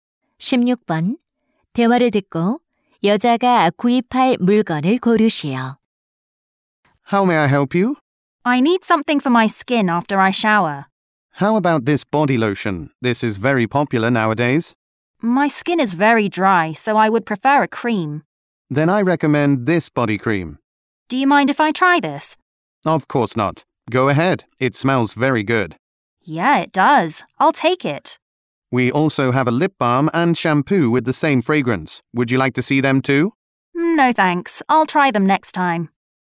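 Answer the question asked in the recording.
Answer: 바디 크림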